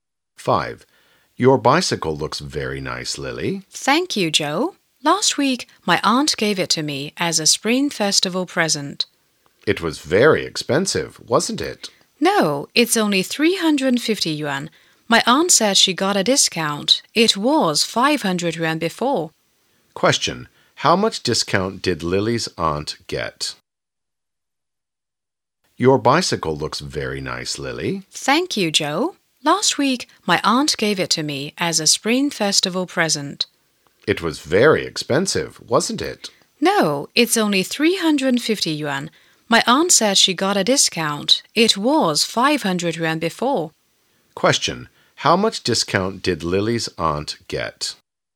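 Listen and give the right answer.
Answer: 150 yuan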